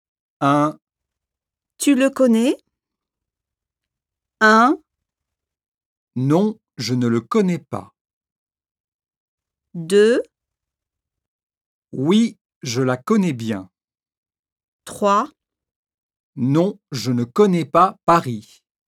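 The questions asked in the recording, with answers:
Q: Tu le connais?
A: 1: Non, je ne le connais pas.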